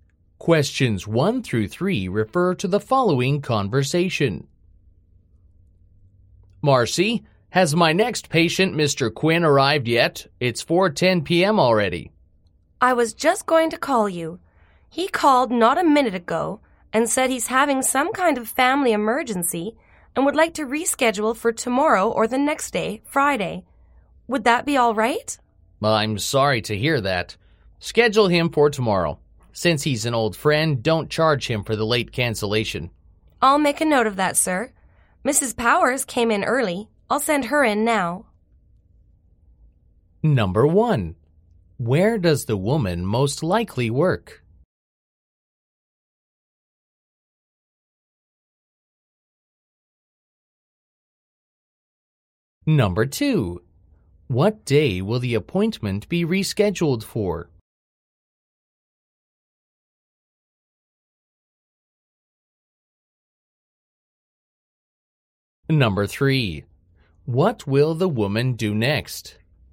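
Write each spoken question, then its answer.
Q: What day will the appointment be rescheduled for?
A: Tomorrow (Thursday)

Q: What will the woman do next?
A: Send Mrs. Powers in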